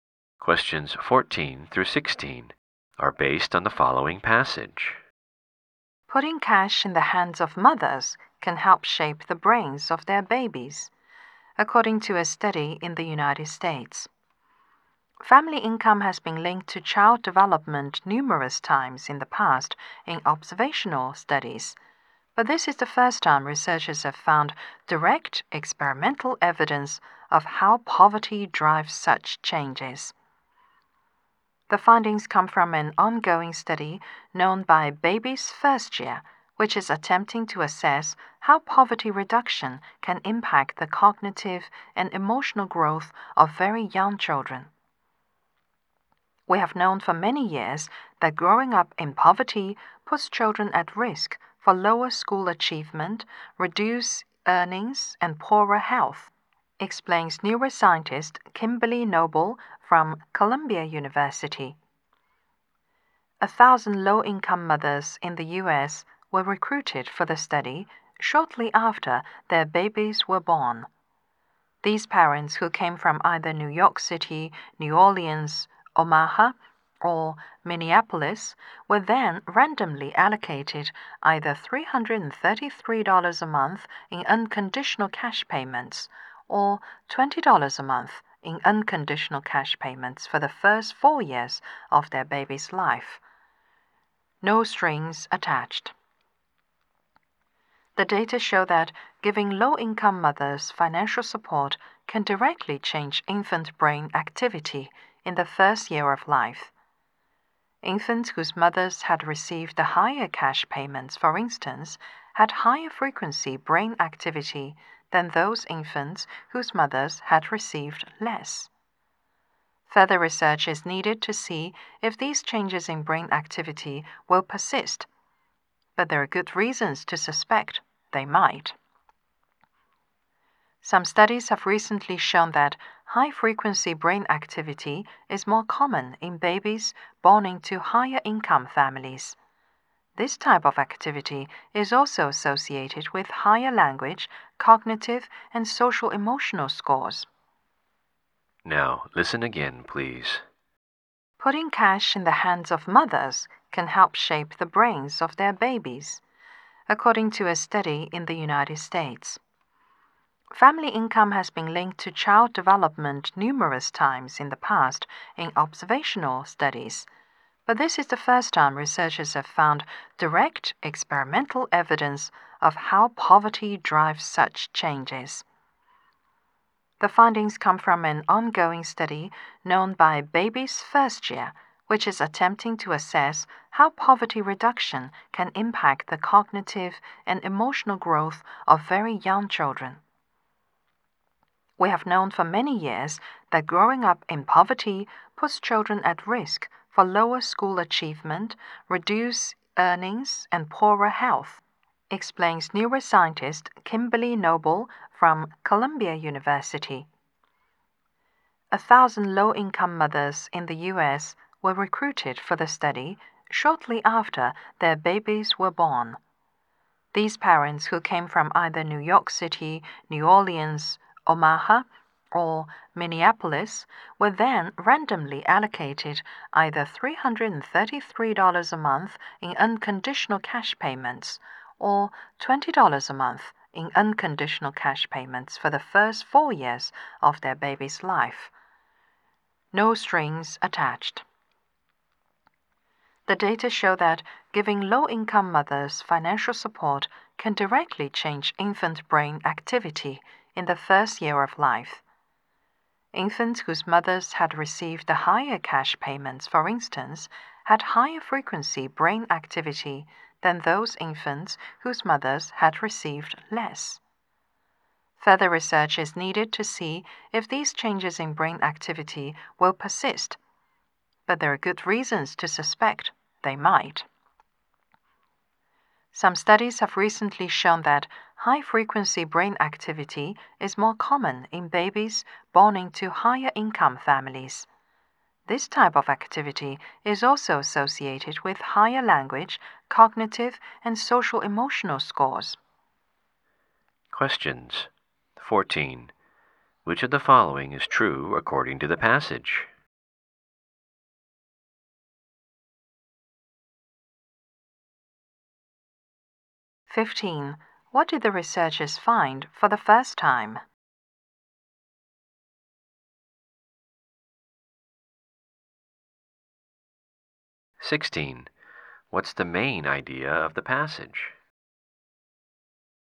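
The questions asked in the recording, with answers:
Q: What did the researchers find for the first time?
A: Direct experimental evidence of how poverty drives changes in child development.

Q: What's the main idea of the passage?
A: Giving cash to low-income mothers can shape their babies' brains.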